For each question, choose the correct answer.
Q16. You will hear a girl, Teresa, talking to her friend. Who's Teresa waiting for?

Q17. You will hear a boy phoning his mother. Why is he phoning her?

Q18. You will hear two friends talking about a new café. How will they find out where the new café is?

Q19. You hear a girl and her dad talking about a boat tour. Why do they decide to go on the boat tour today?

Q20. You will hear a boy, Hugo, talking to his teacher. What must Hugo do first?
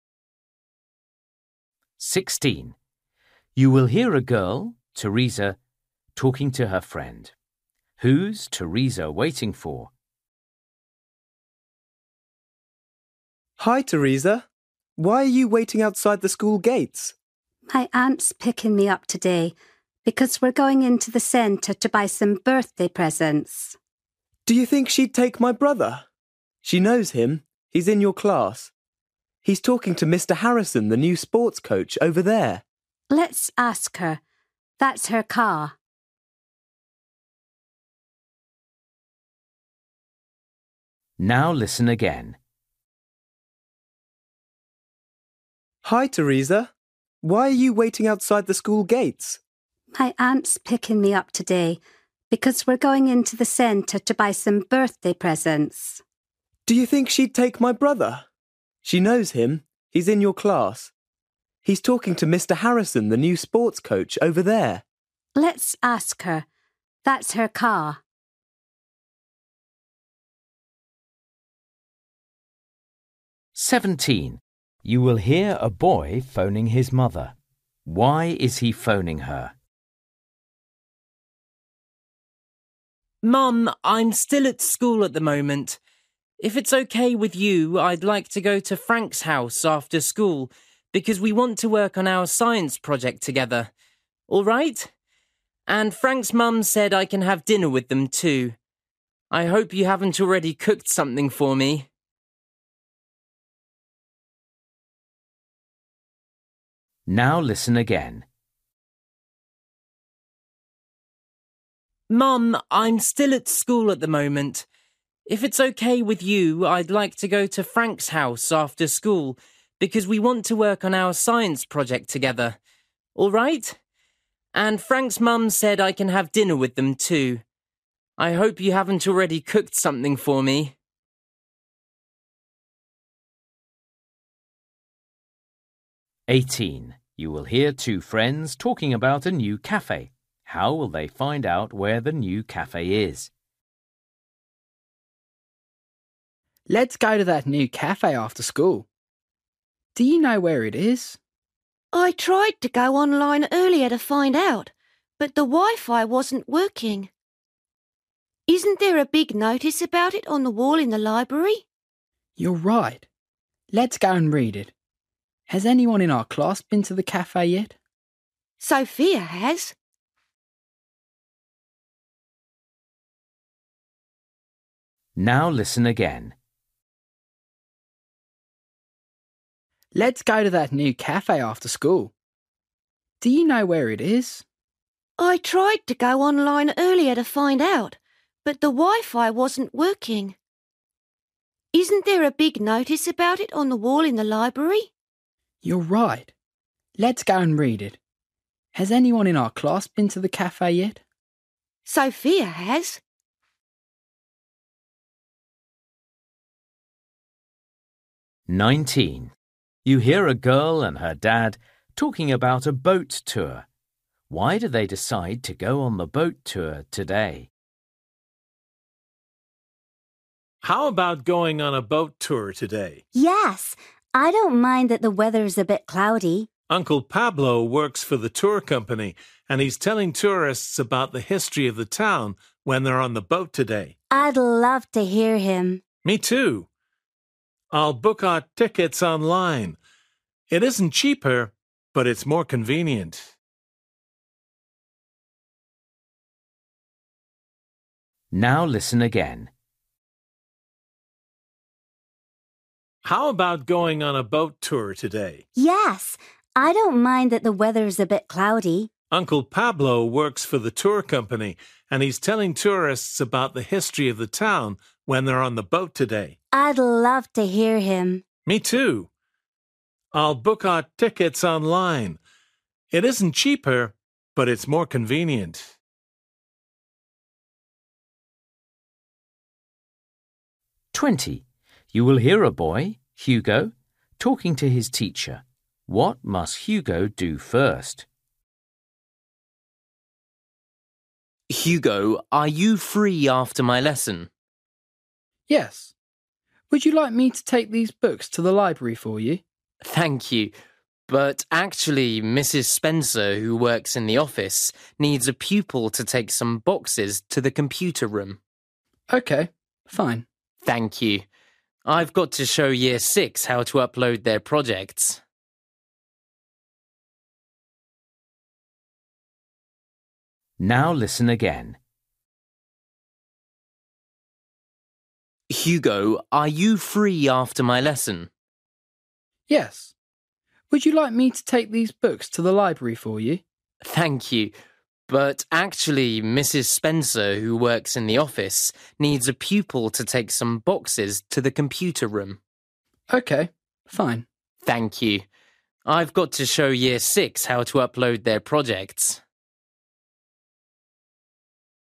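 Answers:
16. Her aunt
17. To ask if he can go to Frank's house after school (and have dinner there)
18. By reading a notice on the wall in the library
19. Uncle Pablo is telling tourists about the town's history on the boat today
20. Take some boxes to the computer room

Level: Luyện nghe trình độ A2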